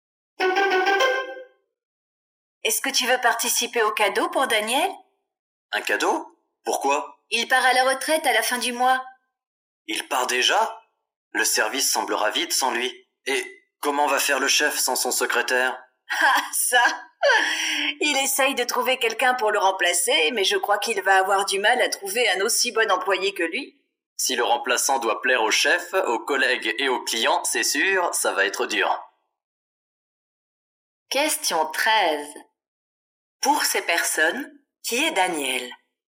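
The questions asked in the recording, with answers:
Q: Pour ces personnes, qui est Daniel?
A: Un collègue, le secrétaire du chef, qui part à la retraite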